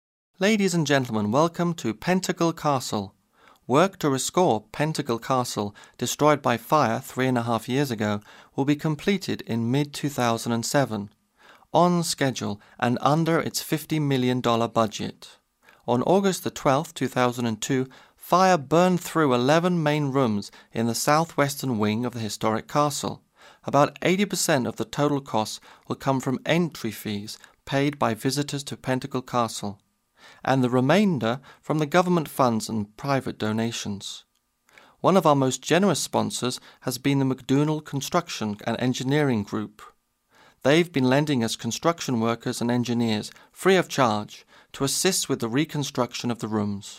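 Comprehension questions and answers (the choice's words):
Listen to the short talk and choose the best answer for the following question:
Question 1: How much of the castle was burned?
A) 80%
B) 50%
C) 11 rooms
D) 3 and a half wings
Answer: 11 rooms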